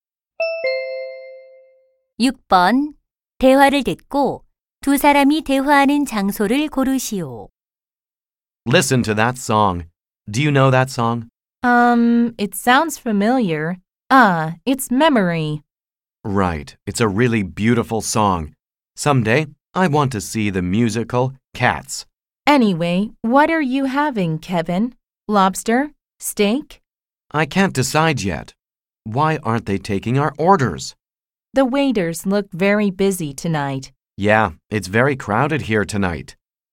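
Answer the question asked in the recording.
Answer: 식당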